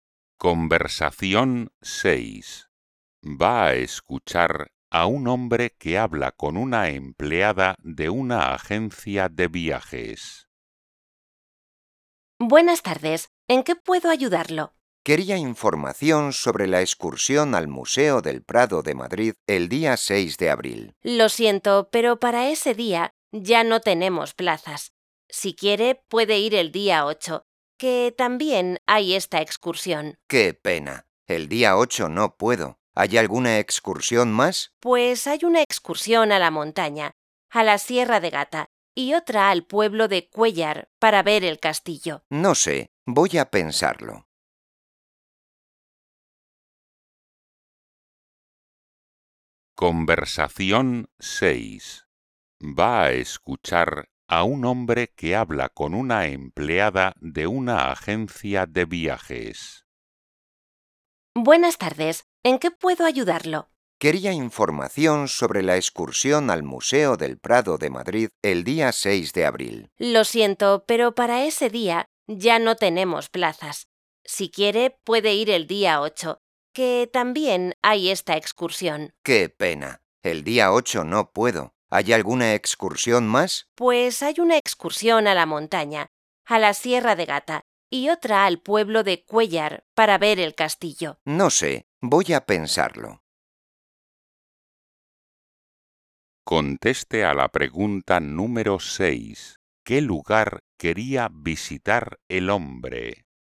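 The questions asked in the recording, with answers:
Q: ¿Qué lugar quería visitar el hombre?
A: El Museo del Prado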